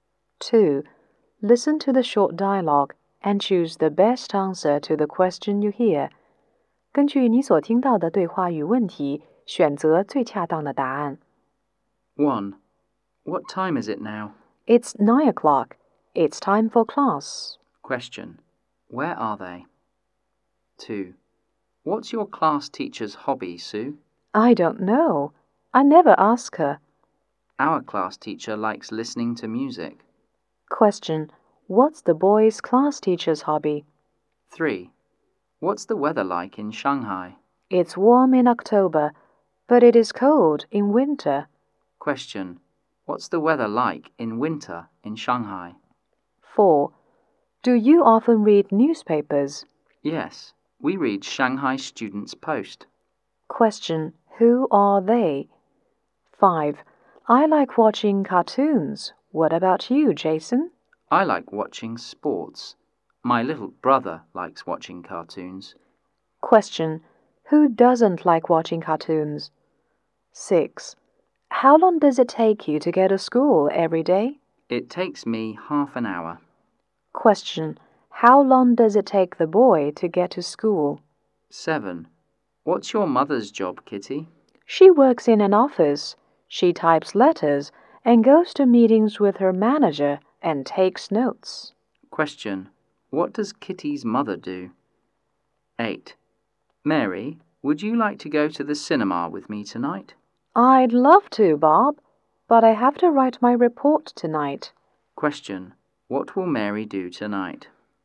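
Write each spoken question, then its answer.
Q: Question. What's the boy's class teacher's hobby?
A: Listening to music

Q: Question. What's the weather like in winter in Shanghai?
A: Cold

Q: Question. Who are they?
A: Students

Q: Question. Who doesn't like watching cartoons?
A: Jason

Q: Question. How long does it take the boy to get to school?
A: Half an hour

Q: Question. What does Kitty's mother do?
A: She works in an office as a secretary

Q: Question. What will Mary do tonight?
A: Write her report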